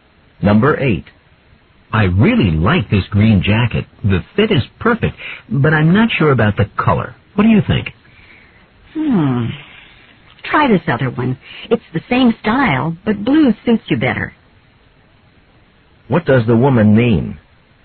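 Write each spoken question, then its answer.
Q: What does the woman mean?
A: The man should get the blue jacket instead.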